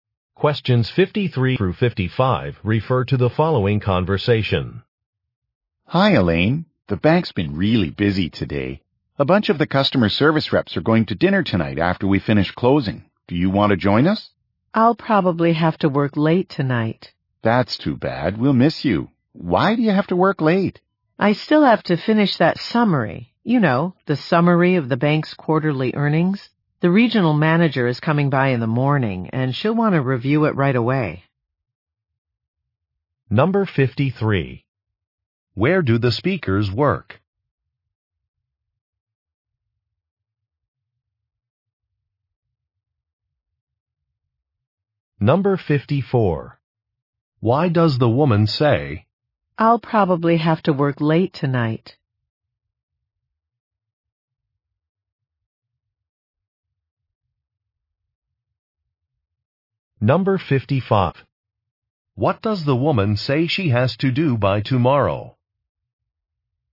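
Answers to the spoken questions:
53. At a bank
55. Finish a summary of the bank's quarterly earnings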